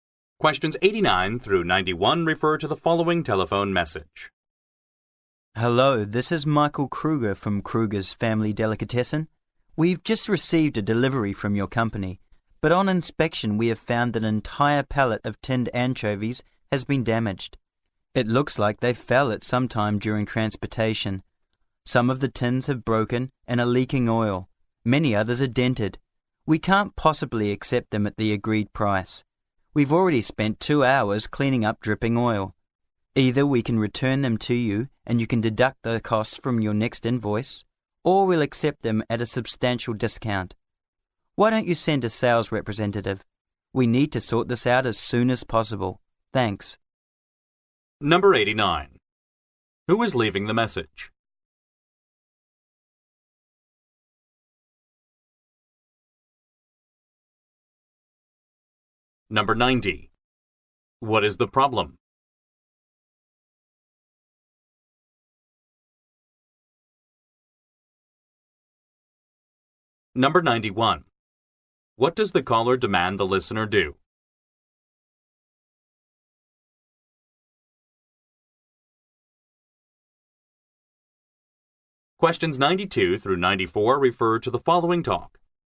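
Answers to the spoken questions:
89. Michael Kruger of Kruger's Family Delicatessen
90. A pallet of tinned anchovies was damaged
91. Send a sales representative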